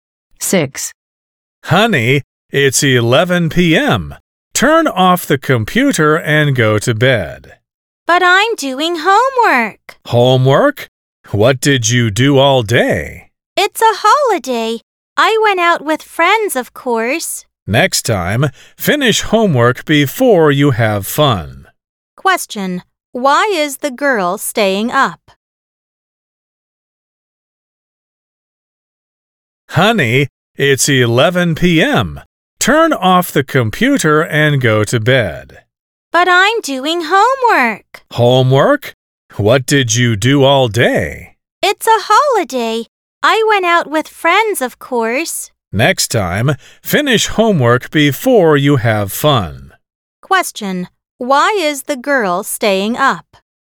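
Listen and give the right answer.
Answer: She is doing homework she didn't finish because she went out with friends all day.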